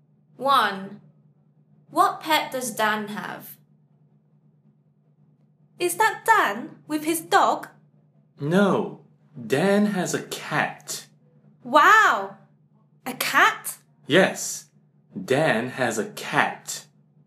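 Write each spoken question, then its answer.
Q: What pet does Dan have?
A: a cat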